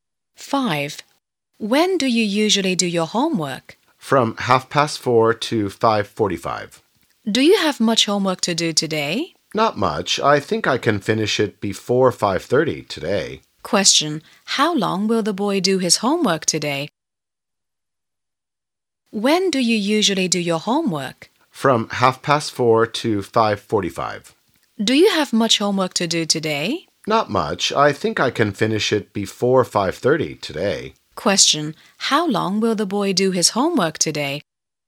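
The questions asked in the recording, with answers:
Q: How long will the boy do his homework today?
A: One hour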